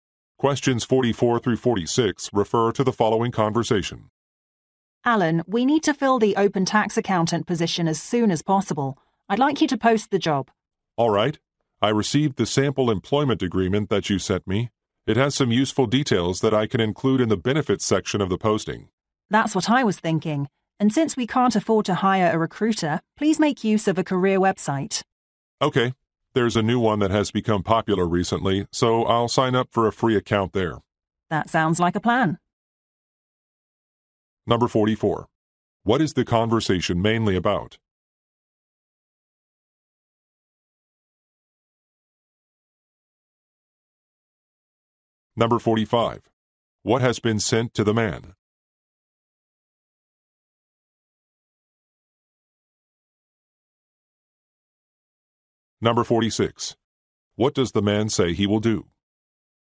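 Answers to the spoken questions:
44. Hiring a tax accountant / posting a job
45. A sample employment agreement
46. Sign up for a free account on a career website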